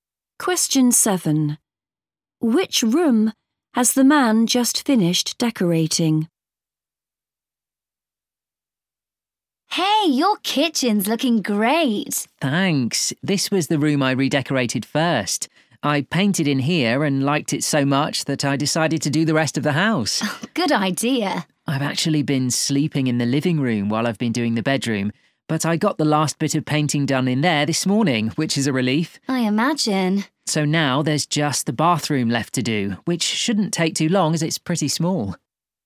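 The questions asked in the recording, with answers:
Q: Which room has the man just finished decorating?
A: The bedroom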